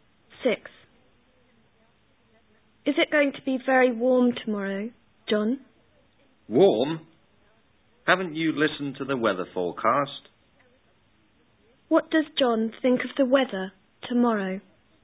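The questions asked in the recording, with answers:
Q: What does John think of the weather tomorrow?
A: It won't be warm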